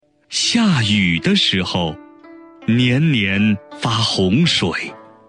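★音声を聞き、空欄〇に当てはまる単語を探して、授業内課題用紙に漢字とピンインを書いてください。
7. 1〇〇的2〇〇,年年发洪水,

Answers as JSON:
{"7": "1下雨 2时候"}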